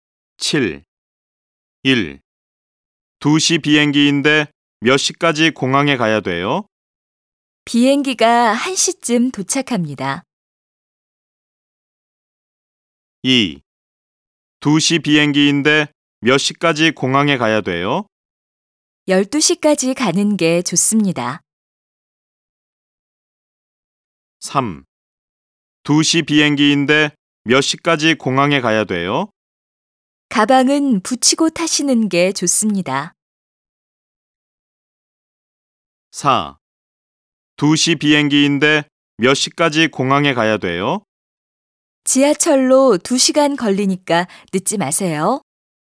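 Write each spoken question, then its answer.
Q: 2시 비행기인데 몇 시까지 공항에 가야 돼요?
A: 2: 12시까지 가는 게 좋습니다.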